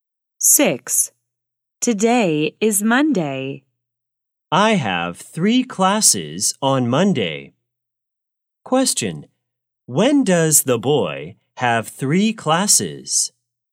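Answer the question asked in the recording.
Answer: On Monday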